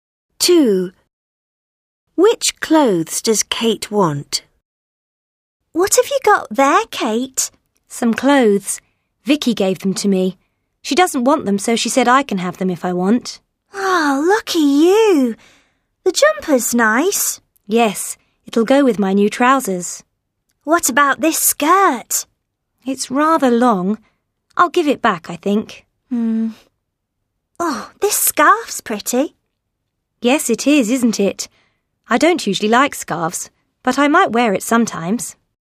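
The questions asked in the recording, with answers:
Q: Which clothes does Kate want?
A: The jumper and the scarf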